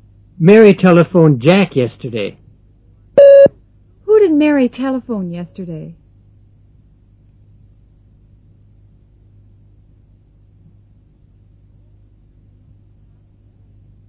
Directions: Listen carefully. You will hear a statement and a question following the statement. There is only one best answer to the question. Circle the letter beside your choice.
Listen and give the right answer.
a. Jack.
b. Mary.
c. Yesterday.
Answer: a. Jack.

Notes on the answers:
Mary telephoned Jack yesterday.